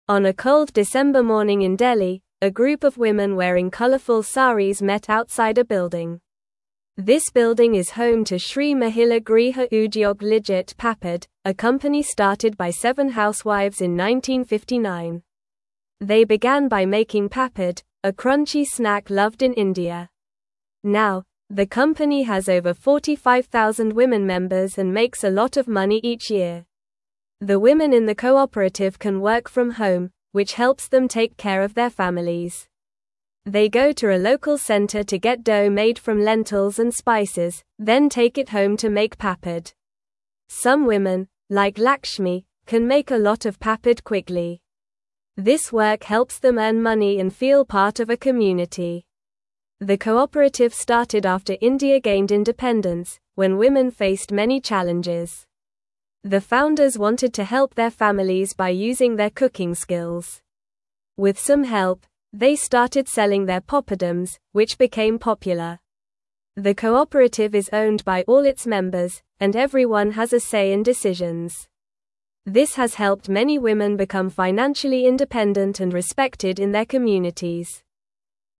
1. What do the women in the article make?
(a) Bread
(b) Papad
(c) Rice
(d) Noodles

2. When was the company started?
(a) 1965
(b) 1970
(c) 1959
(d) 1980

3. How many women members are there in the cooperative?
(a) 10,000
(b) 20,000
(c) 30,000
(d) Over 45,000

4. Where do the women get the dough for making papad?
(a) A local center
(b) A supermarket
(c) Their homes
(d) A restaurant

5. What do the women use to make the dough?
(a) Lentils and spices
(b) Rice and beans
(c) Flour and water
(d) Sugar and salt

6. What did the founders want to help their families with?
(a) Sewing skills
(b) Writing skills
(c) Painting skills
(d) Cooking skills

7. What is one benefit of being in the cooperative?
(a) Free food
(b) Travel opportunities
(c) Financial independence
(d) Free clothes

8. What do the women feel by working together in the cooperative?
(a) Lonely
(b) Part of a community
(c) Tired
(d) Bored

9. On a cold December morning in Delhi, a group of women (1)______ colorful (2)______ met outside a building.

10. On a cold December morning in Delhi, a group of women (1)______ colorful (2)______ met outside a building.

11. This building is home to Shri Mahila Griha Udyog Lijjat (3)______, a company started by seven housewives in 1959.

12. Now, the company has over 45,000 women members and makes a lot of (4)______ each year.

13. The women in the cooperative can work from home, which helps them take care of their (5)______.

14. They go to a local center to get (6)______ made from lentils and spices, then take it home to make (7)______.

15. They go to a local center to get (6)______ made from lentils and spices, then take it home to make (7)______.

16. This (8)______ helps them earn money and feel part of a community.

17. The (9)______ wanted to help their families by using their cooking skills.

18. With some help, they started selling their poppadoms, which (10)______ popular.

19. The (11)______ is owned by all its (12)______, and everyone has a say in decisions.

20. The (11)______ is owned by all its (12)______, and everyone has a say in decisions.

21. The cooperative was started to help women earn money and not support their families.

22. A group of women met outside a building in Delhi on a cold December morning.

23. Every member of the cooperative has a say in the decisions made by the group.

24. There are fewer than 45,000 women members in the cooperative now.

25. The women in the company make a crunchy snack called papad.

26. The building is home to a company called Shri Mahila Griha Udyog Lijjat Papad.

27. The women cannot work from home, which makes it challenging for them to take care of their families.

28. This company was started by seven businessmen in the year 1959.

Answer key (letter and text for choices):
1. (b) Papad
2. (c) 1959
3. (d) Over 45,000
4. (a) A local center
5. (a) Lentils and spices
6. (d) Cooking skills
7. (c) Financial independence
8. (b) Part of a community
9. wearing
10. saris
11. Papad
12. money
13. families
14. dough
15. papad
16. work
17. founders
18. became
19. cooperative
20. members
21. False
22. True
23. True
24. False
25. True
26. True
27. False
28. False

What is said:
On a cold December morning in Delhi, a group of women wearing colorful saris met outside a building. This building is home to Shri Mahila Griha Udyog Lijjat Papad, a company started by seven housewives in 1959. They began by making papad, a crunchy snack loved in India. Now, the company has over 45,000 women members and makes a lot of money each year.
The women in the cooperative can work from home, which helps them take care of their families. They go to a local center to get dough made from lentils and spices, then take it home to make papad. Some women, like Lakshmi, can make a lot of papad quickly. This work helps them earn money and feel part of a community.
The cooperative started after India gained independence, when women faced many challenges. The founders wanted to help their families by using their cooking skills. With some help, they started selling their poppadoms, which became popular. The cooperative is owned by all its members, and everyone has a say in decisions. This has helped many women become financially independent and respected in their communities.

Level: Level 2